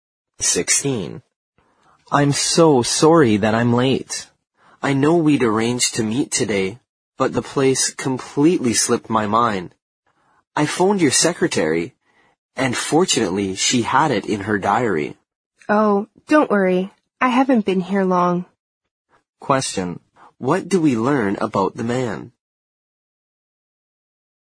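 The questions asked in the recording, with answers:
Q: What do we learn about the man?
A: He forgot the meeting place and got it from the secretary.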